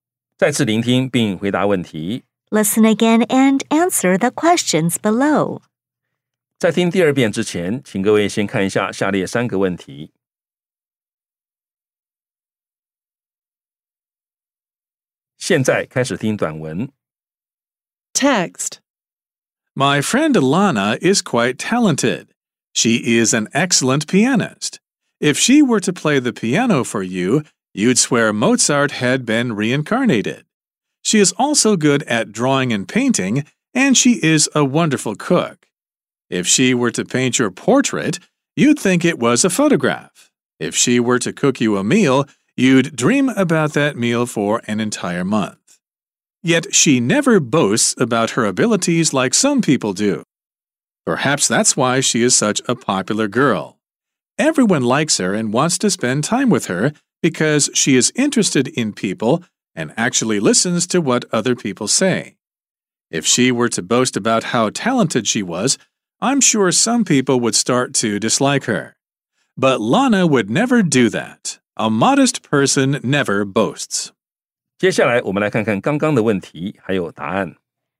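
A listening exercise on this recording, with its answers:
再次聆聽並回答問題 Listen again and answer the questions below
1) What is Lana good at?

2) What does the speaker think is the reason for Lana's popularity?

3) What might happen if Lana boasted about her talents?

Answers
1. Playing the piano, drawing and painting, and cooking.
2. She never boasts about her abilities; she is interested in people and actually listens to them.
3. Some people would start to dislike her.

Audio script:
My friend Lana is quite talented. She is an excellent pianist. If she were to play the piano for you, you'd swear Mozart had been reincarnated. She is also good at drawing and painting, and she is a wonderful cook. If she were to paint your portrait, you'd think it was a photograph. If she were to cook you a meal, you'd dream about that meal for an entire month.
Yet, she never boasts about her abilities like some people do. 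Perhaps that's why she is such a popular girl. Everyone likes her and wants to spend time with her because she is interested in people and actually listens to what other people say. If she were to boast about how talented she was, I'm sure some people would start to dislike her. But Lana would never do that.

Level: 中級口語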